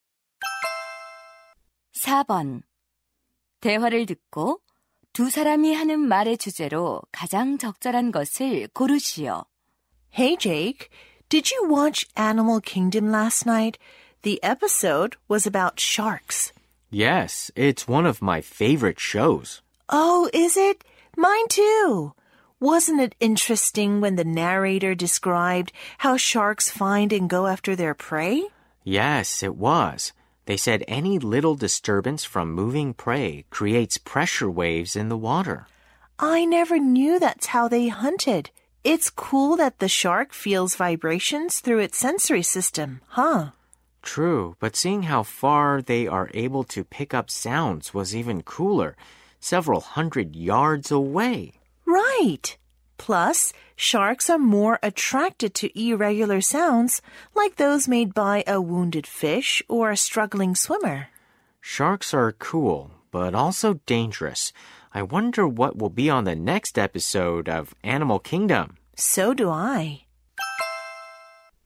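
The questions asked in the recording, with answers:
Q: 대화를 듣고 두 사람이 하는 말의 주제로 가장 적절한 것을 고르시오.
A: 상어가 먹이를 감지하고 사냥하는 방법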